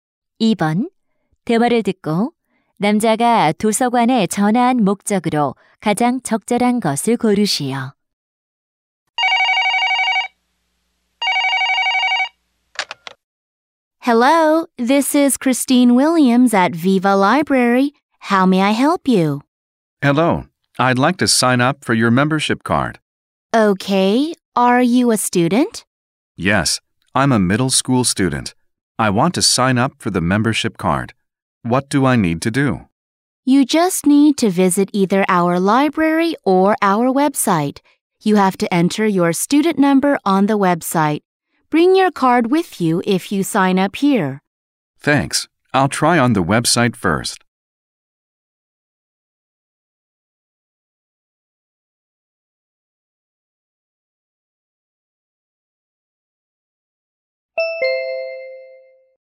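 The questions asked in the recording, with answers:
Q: 대화를 듣고 남자가 도서관에 전화한 목적으로 가장 적절한 것을 고르시오.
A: 회원 카드를 신청하려고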